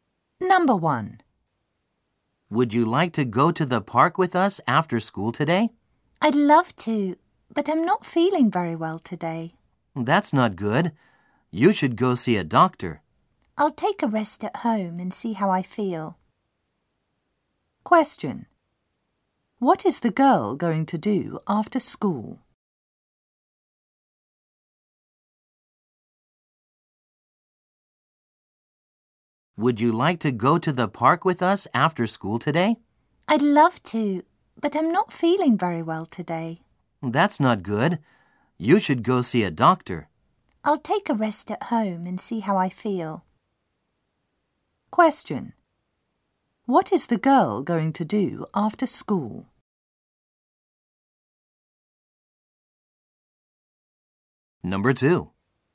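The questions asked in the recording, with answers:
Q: What is the girl going to do after school?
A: Rest at home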